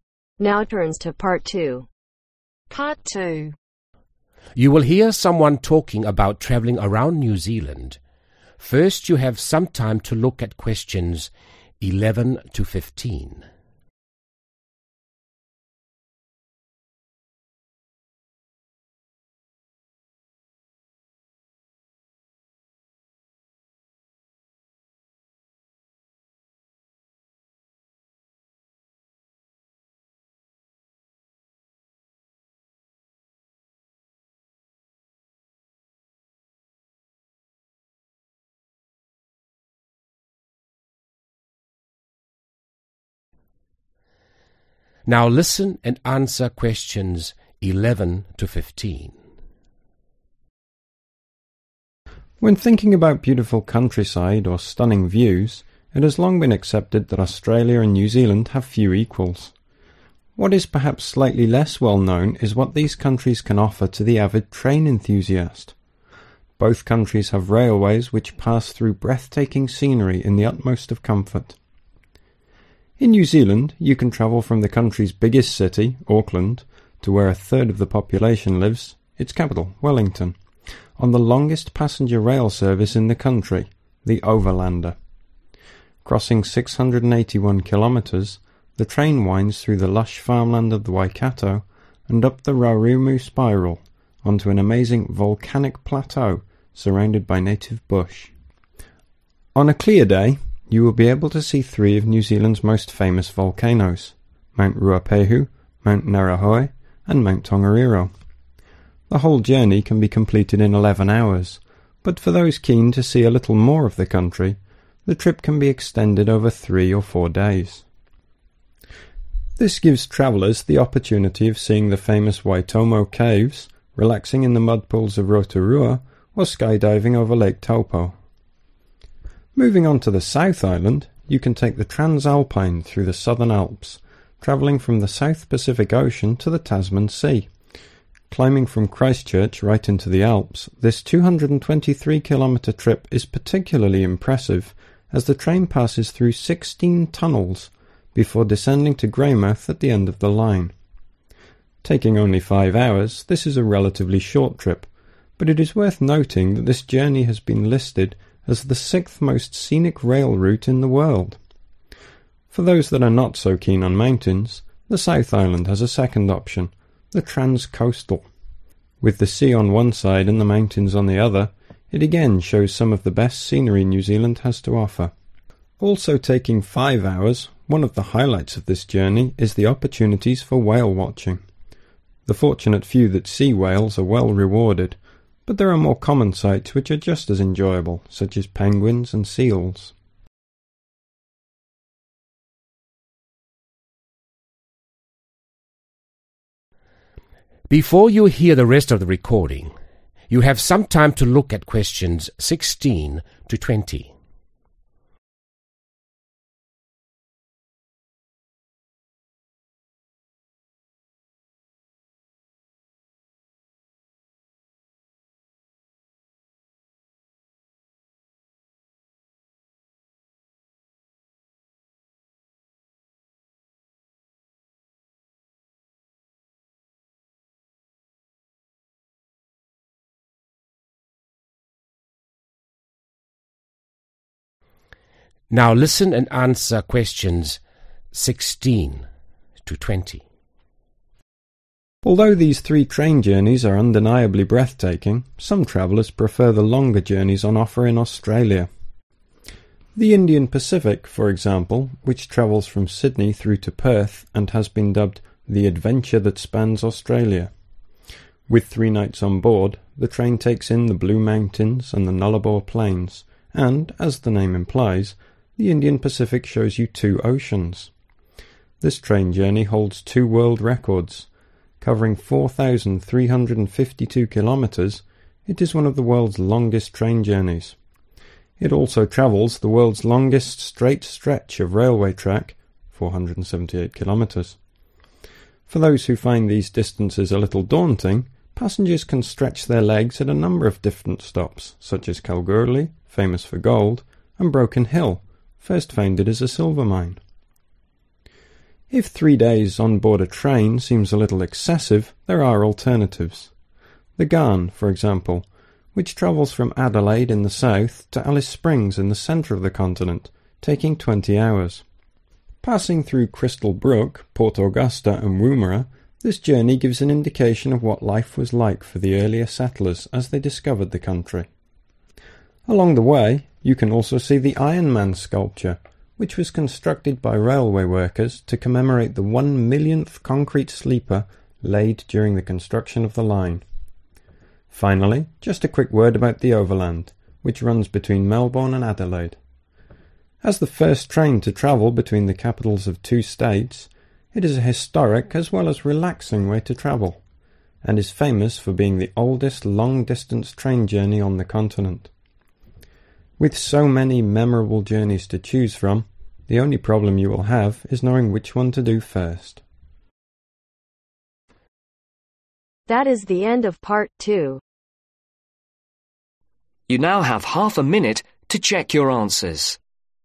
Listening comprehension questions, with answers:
Complete the table below. Write NO MORE THAN TWO WORDS OR A NUMBER for each answer.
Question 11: Over lander | (11)............ | 3 volcanoes | 11 |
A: 681

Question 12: Transalpine | 223 | (12) 16 ............ | (13)............ |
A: Tunnels

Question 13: Transalpine | 223 | (12) 16 ............ | (13)............ |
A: 5

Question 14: (14)............ | x | (15)............ | 5 |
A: Trans coastal

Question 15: (14)............ | x | (15)............ | 5 |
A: Whale watching

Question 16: Taking three days to complete, the (16)............ is one of the world's longest train journeys.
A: Indian Pacific

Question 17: The Ghan is shorter, passing through towns built by the (17)............ .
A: Early settlers

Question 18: There is also sculpture designed to mark the laying of the (18)............ sleeper.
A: Millionth

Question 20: The Overland was the first train to travel between two (19)............ and it is also the oldest journey of its kind on (20)............ .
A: The continent